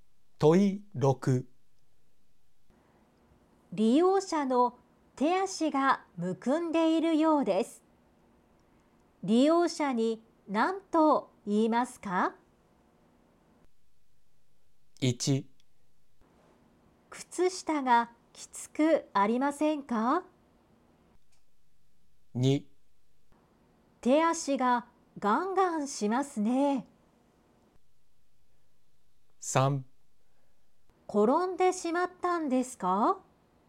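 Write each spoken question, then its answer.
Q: 利用者の手足がむくんでいるようです。利用者に何と言いますか?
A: 1: 靴下がきつくありませんか?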